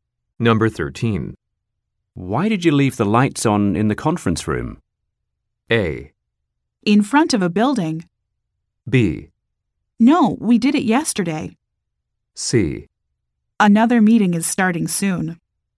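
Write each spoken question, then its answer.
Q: Why did you leave the lights on in the conference room?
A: C: Another meeting is starting soon.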